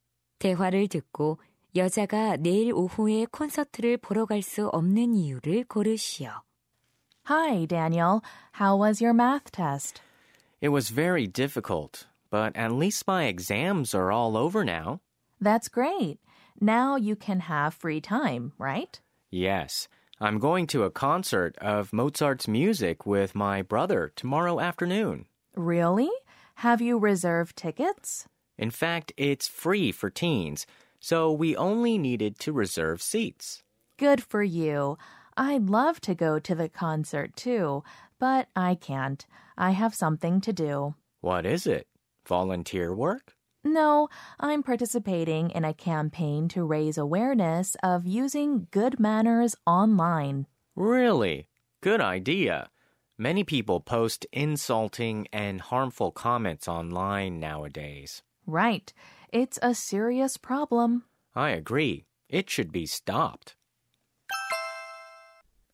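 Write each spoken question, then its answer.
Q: 대화를 듣고 여자가 내일 오후에 콘서트를 보러 갈 수 없는 이유를 고르시오.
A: 온라인 예절 인식 개선 캠페인에 참여해야 해서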